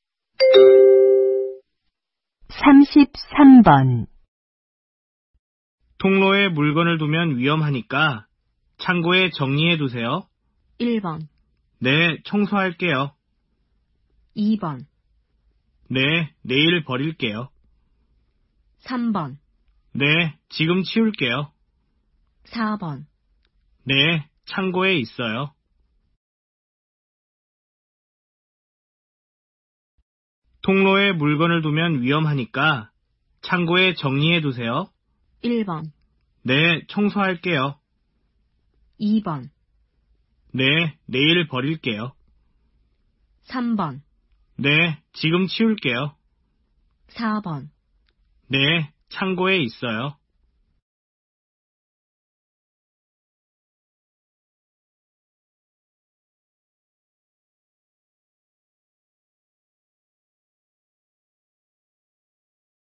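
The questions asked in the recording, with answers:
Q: 통로에 물건을 두면 위험하니까 창고에 정리해 두세요.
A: 3: 네, 지금 치울게요.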